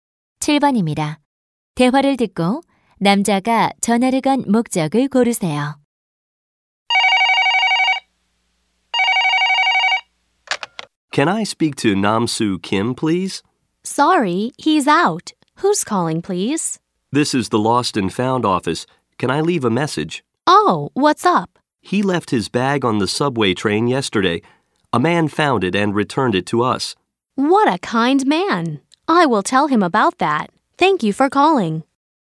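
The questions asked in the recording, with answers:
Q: 대화를 듣고 남자가 전화를 건 목적을 고르세요.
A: 잃어버린 가방을 찾았다고 알려 주려고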